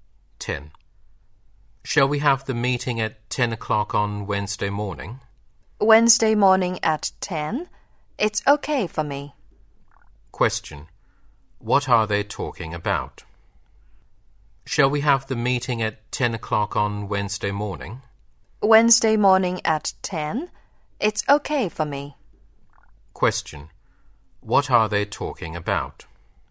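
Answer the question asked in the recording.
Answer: The time of a meeting (10 o'clock on Wednesday morning).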